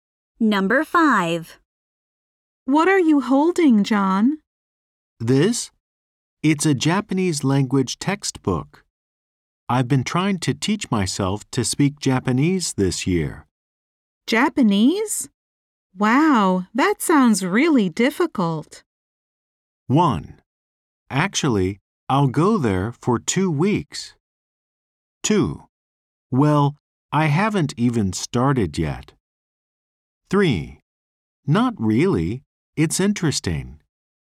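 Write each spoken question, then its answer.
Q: Japanese? Wow, that sounds really difficult.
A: 3: Not really. It's interesting.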